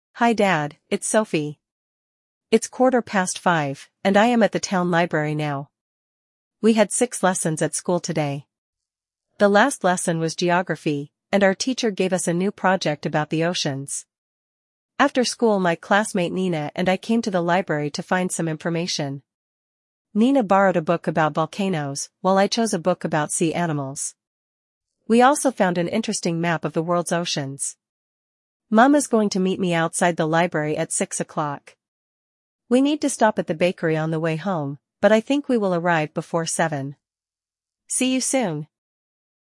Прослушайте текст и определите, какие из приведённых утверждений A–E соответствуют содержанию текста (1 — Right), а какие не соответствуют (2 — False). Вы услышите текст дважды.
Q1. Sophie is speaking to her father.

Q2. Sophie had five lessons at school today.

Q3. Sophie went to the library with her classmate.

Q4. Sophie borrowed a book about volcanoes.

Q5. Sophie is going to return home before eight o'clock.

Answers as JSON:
{"1": "Right", "2": "False", "3": "Right", "4": "False", "5": "Right"}

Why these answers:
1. Софи обращается к папе: Hi Dad, it's Sophie.
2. У Софи было шесть уроков, а не пять.
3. После школы Софи пошла в библиотеку со своей одноклассницей Ниной.
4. Книгу о вулканах взяла Нина. Софи выбрала книгу о морских животных.
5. Софи предполагает, что вернётся домой до семи часов, то есть раньше восьми.

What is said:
Hi Dad, it's Sophie.
It's quarter past five, and I am at the town library now. We had six lessons at school today. The last lesson was Geography, and our teacher gave us a new project about the oceans.
After school my classmate Nina and I came to the library to find some information. Nina borrowed a book about volcanoes, while I chose a book about sea animals. We also found an interesting map of the world's oceans.
Mum is going to meet me outside the library at six o'clock. We need to stop at the bakery on the way home, but I think we will arrive before seven.
See you soon!

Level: 6 класса